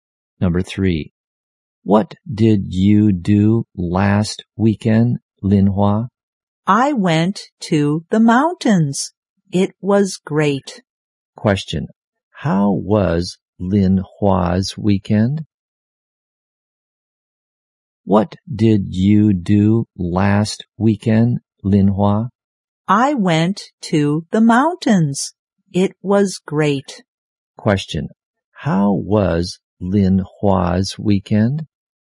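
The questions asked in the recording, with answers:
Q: how was Lin Hua's weekend?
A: Great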